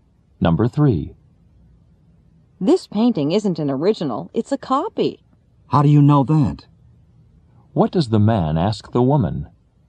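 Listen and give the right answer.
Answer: How she knows the painting is a copy.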